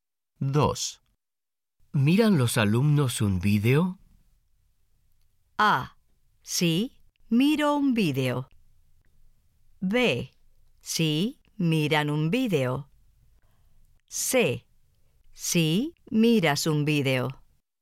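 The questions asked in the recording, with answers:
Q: ¿Miran los alumnos un vídeo?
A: B: Sí, miran un vídeo.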